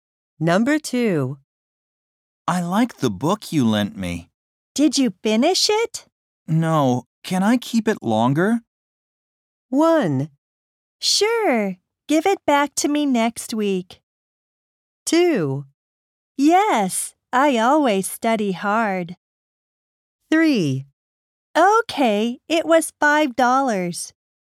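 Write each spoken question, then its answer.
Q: No. Can I keep it longer?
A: 1: Sure. Give it back to me next week.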